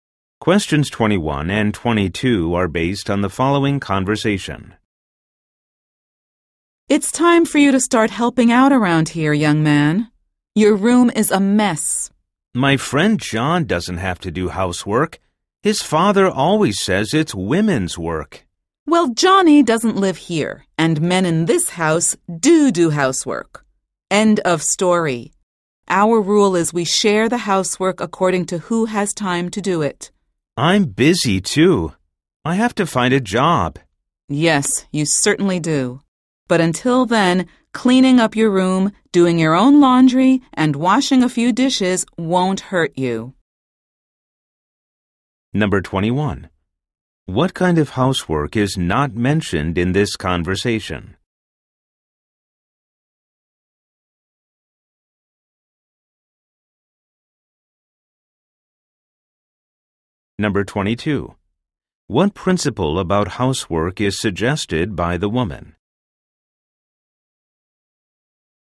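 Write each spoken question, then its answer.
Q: What principle about housework is suggested by the woman?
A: Housework is shared according to who has time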